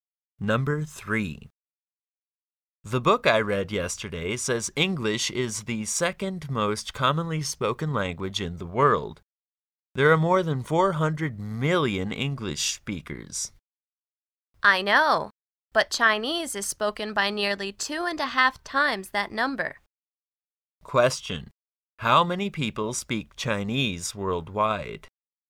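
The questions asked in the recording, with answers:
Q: How many people speak Chinese worldwide?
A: About 1 billion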